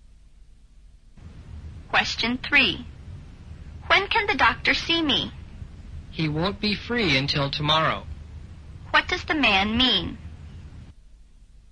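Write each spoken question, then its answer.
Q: What does the man mean?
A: The doctor can't see her until tomorrow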